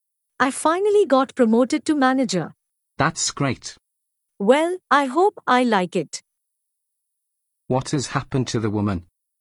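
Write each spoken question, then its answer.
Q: What has happened to the woman?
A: She got promoted to manager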